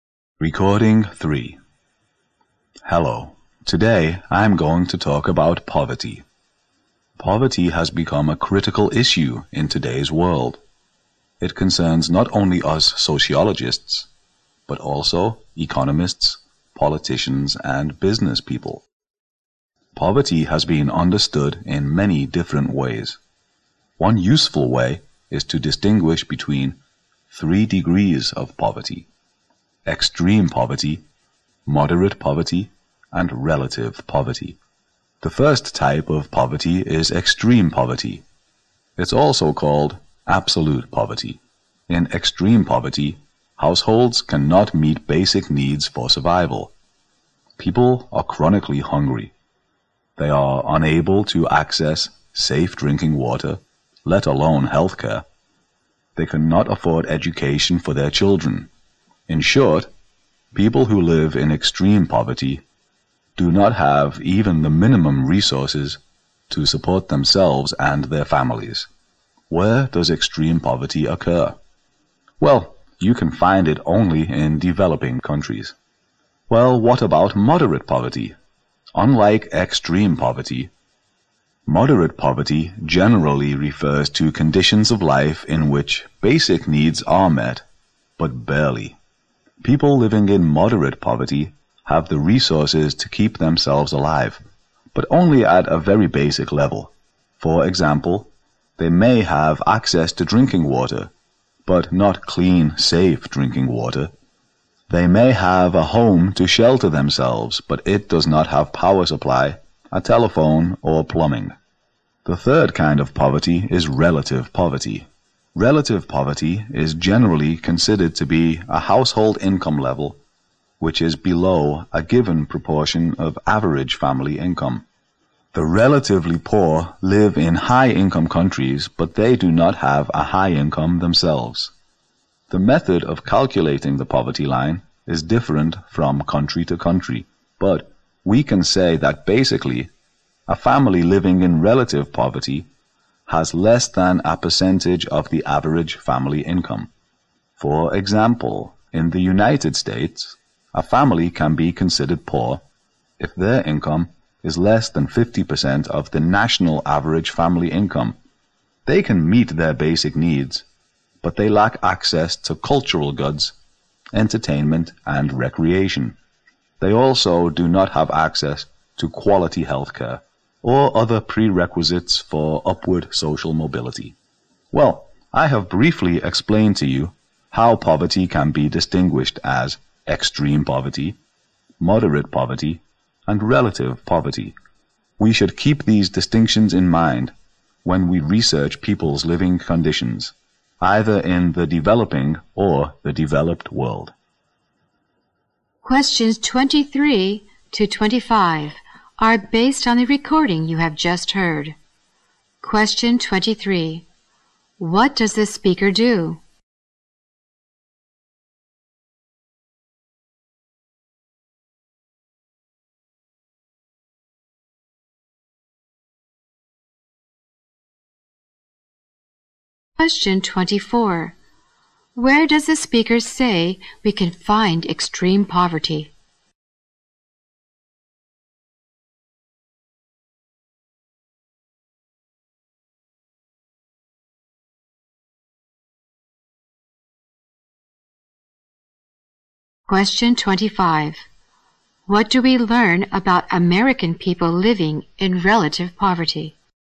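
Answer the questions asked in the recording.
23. He is a sociologist
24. Only in developing countries
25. Their basic needs are met, but they lack access to culture, entertainment and quality healthcare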